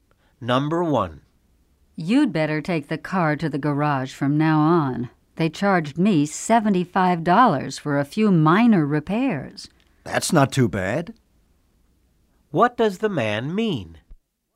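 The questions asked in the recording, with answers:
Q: What does the man mean?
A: $75 is a reasonable price for the repairs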